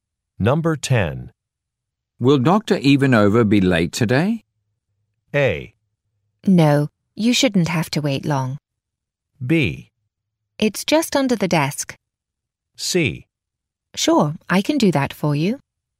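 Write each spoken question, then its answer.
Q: Will Dr. Ivanova be late today?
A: A: No, you shouldn't have to wait long.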